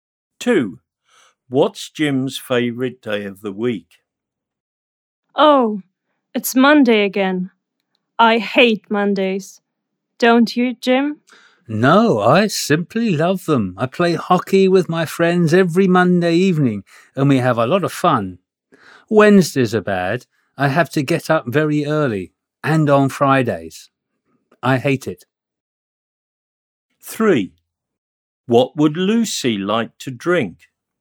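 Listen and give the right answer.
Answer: Monday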